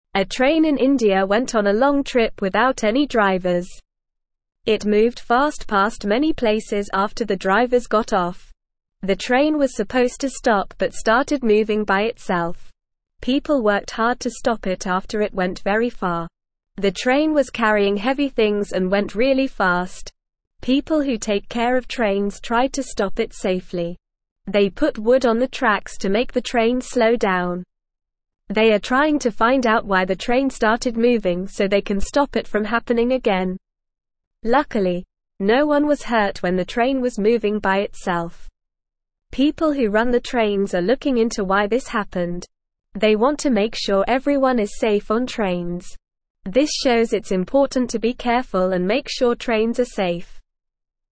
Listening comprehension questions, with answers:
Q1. What happened to the train in India?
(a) It went on a long trip without any drivers.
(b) It crashed into a building.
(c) It stopped at every station.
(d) It went underwater.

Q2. Why did the train start moving by itself?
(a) The drivers got off and it started moving.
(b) It was pushed by a strong wind.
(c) The tracks were slippery.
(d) The train was going too slow.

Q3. How did people try to stop the train?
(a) They called the police for help.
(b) They jumped on the train and pulled the emergency brake.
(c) They ran after the train and tried to catch it.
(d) They put wood on the tracks to make it slow down.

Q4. What were the people trying to find out?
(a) How to make the train go faster.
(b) Why the train started moving by itself.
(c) How to make the train stop at every station.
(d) Why the train was carrying heavy things.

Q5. What happened to the train when it was moving by itself?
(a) It crashed into a car.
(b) It went very far.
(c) It stopped at every station.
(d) It went underwater.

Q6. What did the people who run the trains want to make sure?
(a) The train goes faster.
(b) The train carries heavier things.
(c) Everyone is safe on trains.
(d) The train stops at every station.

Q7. What did the people put on the tracks to make the train slow down?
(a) Metal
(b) Plastic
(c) Wood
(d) Rubber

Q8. A train in India (1)______ on a long trip without any drivers.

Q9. It (2)______ fast past many (3)______ after the drivers got off.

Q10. It (2)______ fast past many (3)______ after the drivers got off.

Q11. People who take (4)______ of (5)______ tried to stop it safely.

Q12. People who take (4)______ of (5)______ tried to stop it safely.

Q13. They put wood on the (6)______ to make the (7)______ (8)______ down.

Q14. They put wood on the (6)______ to make the (7)______ (8)______ down.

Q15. They put wood on the (6)______ to make the (7)______ (8)______ down.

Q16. They are trying to find out why the train started moving so they can stop it from (9)______ again.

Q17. People who run the trains are looking into why this (10)______.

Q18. This (11)______ it's important to be (12)______ and make sure trains are safe.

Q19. This (11)______ it's important to be (12)______ and make sure trains are safe.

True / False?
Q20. The train was carrying heavy things and went really fast.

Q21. People didn't work hard to stop the train after it went very far.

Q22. Luckily, no one was hurt when the train was moving on its own.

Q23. People put wood on the tracks to make the train slow down.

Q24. The train moved slowly past many places after the drivers got off.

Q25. The train was not supposed to stop but started moving by itself.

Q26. People are trying to find out why the train started moving by itself.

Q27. A train in India went on a short trip without any drivers.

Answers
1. a
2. a
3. d
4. b
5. b
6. c
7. c
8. went
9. moved
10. places
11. care
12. trains
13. tracks
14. train
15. slow
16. happening
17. happened
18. shows
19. careful
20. True
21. False
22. True
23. True
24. False
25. False
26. True
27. False

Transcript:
A train in India went on a long trip without any drivers. It moved fast past many places after the drivers got off. The train was supposed to stop but started moving by itself. People worked hard to stop it after it went very far.
People who take care of trains tried to stop it safely. They put wood on the tracks to make the train slow down. They are trying to find out why the train started moving so they can stop it from happening again.
Luckily, no one was hurt when the train was moving by itself. People who run the trains are looking into why this happened. They want to make sure everyone is safe on trains. This shows it's important to be careful and make sure trains are safe.

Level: Level 2

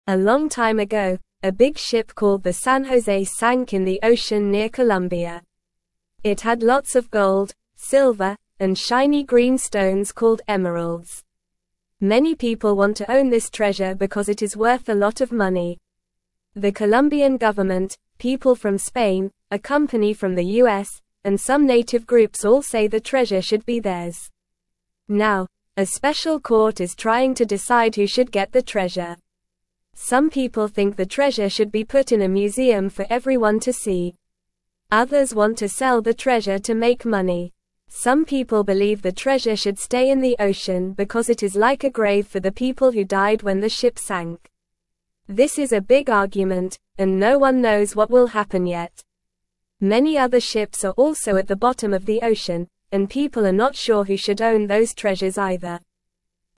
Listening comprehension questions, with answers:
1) A long time ago, a big ship (1)______ the San José sank in the ocean near Colombia.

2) Many people (2)______ to own this treasure because it is worth a lot of money.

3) The Colombian government, (3)______ from Spain, a company from the US, and some native groups all say the treasure should be theirs.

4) Now, a special court is trying to (4)______ who should get the treasure.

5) Some people (5)______ the treasure should be put in a museum for everyone to see.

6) Others want to sell the treasure to (6)______ money.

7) Some people believe the treasure should stay in the ocean because it is like a grave for the people who (7)______ when the ship sank.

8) What kind of stones were on the San José ship?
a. Rubies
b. Sapphires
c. Emeralds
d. Diamonds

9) Where did the San José sink?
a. Near Spain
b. Near the US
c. Near Mexico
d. Near Colombia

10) What do some people want to do with the treasure?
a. Throw it away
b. Eat it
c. Put it in a museum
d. Hide it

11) Why do some people think the treasure should stay in the ocean?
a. Because it is like a grave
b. Because it is fun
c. Because it is shiny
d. Because it smells good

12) What are some people not sure about?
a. What to eat for dinner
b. What color the treasure is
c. How to swim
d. Who should own other sunken ship treasures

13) Who thinks the treasure should be sold to make money?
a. No one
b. Some people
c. Everyone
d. Animals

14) What is the big argument about?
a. Who should get the treasure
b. What to watch on TV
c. What to play with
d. What to wear to a party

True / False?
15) Some people think the treasure should stay in the ocean as a grave for the people who died.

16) Some people want the treasure in a private collection for a select few to see.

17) Many other ships are also at the top of the ocean with treasures, and it's unclear who should own them.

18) The Colombian government, people from Spain, a US company, and native groups all think they should have the treasure.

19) A small ship sank recently with plastic toys and old newspapers inside.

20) Others want to sell the treasure to make money.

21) A special court is deciding who should get the treasure.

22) Many people want the treasure because it is not worth a lot of money.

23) What sank in the ocean near Colombia a long time ago?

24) Why do many people want to own the treasure from the San José ship?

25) Where do some people think the treasure should be put?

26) What are people not sure about with many other ships at the bottom of the ocean?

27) Do people know yet what will happen with the treasure from the San José ship?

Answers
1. called
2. want
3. people
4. decide
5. think
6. make
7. died
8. c
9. d
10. c
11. a
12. d
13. b
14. a
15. True
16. False
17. False
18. True
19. False
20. True
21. True
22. False
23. A big ship called the San José sank in the ocean near Colombia.
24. Because it has lots of gold, silver, and shiny green stones called emeralds, which are worth a lot of money.
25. Some people think the treasure should be put in a museum for everyone to see.
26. People are not sure who should own the treasures from many other ships at the bottom of the ocean.
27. No, people do not know yet what will happen with the treasure from the San José ship.

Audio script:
A long time ago, a big ship called the San José sank in the ocean near Colombia. It had lots of gold, silver, and shiny green stones called emeralds. Many people want to own this treasure because it is worth a lot of money. The Colombian government, people from Spain, a company from the US, and some native groups all say the treasure should be theirs. Now, a special court is trying to decide who should get the treasure.
Some people think the treasure should be put in a museum for everyone to see. Some people believe the treasure should stay in the ocean because it is like a grave for the people who died when the ship sank. This is a big argument, and no one knows what will happen yet. Many other ships are also at the bottom of the ocean, and people are not sure who should own those treasures either.

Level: Level 1

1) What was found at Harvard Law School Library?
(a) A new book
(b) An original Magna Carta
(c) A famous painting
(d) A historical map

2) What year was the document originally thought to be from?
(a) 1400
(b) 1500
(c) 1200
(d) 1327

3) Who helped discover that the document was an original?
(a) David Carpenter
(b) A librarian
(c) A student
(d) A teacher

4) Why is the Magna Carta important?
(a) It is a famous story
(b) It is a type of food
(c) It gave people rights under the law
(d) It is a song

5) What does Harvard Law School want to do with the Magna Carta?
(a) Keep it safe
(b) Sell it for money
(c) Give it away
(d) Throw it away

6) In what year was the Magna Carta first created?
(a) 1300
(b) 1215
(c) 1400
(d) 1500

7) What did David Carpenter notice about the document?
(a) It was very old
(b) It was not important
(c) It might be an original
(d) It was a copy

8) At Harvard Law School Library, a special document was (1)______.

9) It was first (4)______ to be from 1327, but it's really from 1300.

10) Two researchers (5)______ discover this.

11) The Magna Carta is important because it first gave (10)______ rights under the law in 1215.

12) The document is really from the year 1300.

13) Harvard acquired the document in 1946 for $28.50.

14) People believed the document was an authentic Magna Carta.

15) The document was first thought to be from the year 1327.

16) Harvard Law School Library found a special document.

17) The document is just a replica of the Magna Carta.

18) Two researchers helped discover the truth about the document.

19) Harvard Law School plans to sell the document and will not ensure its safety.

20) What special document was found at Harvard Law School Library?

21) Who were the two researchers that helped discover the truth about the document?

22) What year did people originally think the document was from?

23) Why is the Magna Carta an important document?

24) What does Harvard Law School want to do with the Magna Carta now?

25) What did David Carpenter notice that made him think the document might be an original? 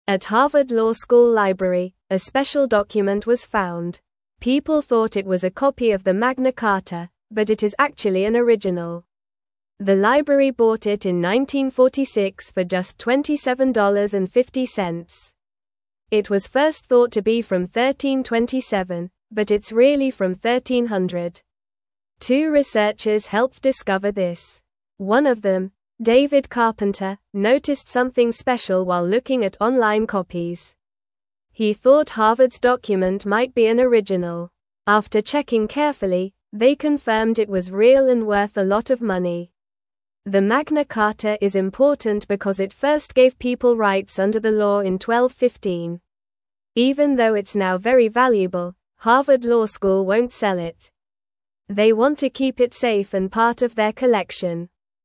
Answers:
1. b
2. d
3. a
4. c
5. a
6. b
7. c
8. found
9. thought
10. helped
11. people
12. True
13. False
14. False
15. True
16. True
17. False
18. True
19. False
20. It was an original Magna Carta.
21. One of the researchers was David Carpenter.
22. People thought it was from 1327.
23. It gave people rights under the law in 1215.
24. They want to keep it safe and part of their collection.
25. He noticed something special while looking at online copies.

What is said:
At Harvard Law School Library, a special document was found. People thought it was a copy of the Magna Carta, but it is actually an original. The library bought it in 1946 for just $27.50. It was first thought to be from 1327, but it's really from 1300.
Two researchers helped discover this. One of them, David Carpenter, noticed something special while looking at online copies. He thought Harvard's document might be an original. After checking carefully, they confirmed it was real and worth a lot of money.
The Magna Carta is important because it first gave people rights under the law in 1215. Even though it's now very valuable, Harvard Law School won't sell it. They want to keep it safe and part of their collection.

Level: Level 2

